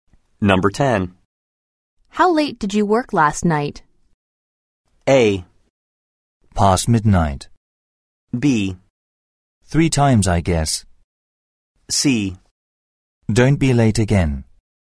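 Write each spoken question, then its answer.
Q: How late did you work last night?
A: A: Past midnight.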